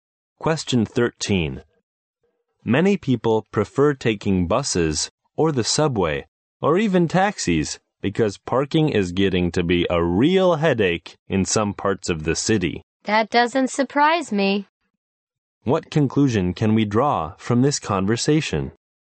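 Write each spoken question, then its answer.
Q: What conclusion can we draw from this conversation?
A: Parking is difficult in some parts of the city, so many people use public transport or taxis.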